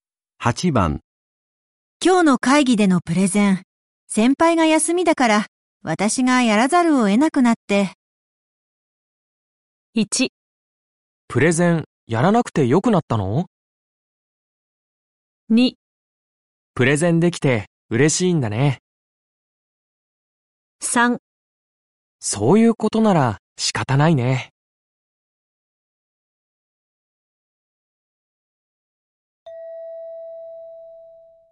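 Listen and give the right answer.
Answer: 3: そういうことなら仕方ないね。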